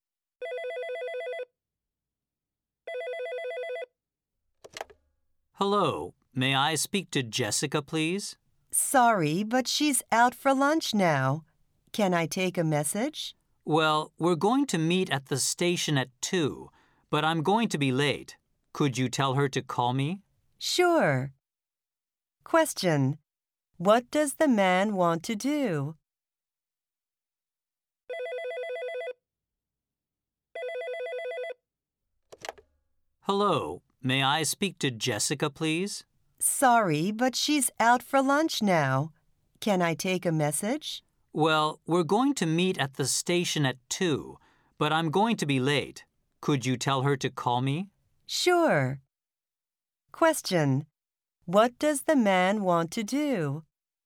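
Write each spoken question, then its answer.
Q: What does the man want to do?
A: Leave a message asking Jessica to call him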